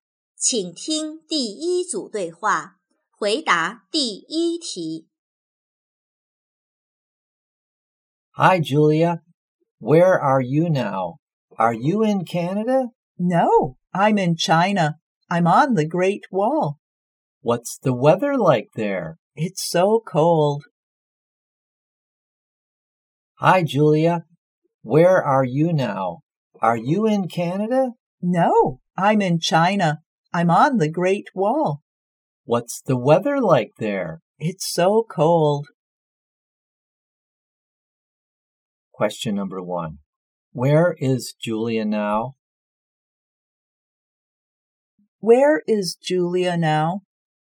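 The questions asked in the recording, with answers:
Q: Where is Julia now?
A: On the Great Wall in China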